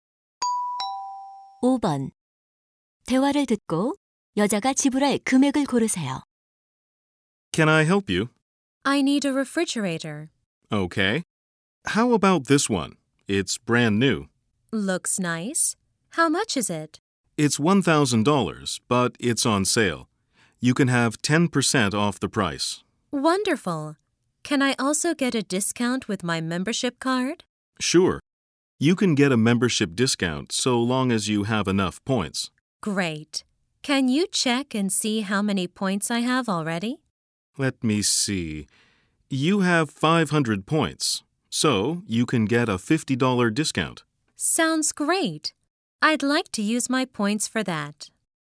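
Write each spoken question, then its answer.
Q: 대화를 듣고 여자가 지불할 금액을 고르세요.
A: 850달러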